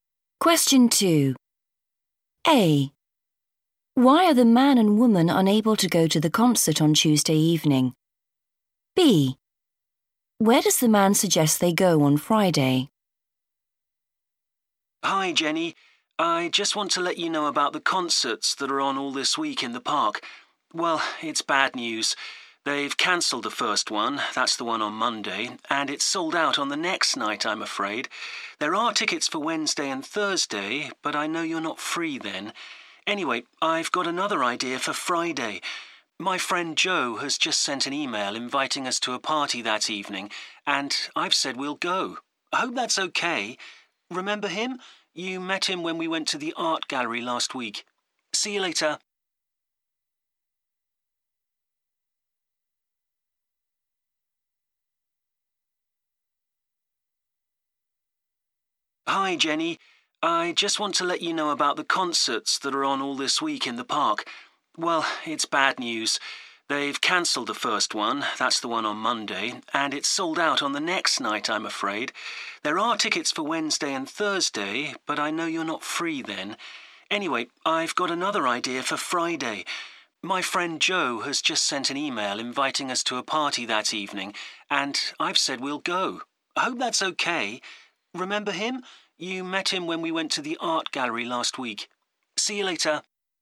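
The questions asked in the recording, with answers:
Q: Why are the man and woman unable to go to the concert on Tuesday evening?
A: it's sold out

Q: Where does the man suggest they go on Friday?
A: to a party (at Joe's)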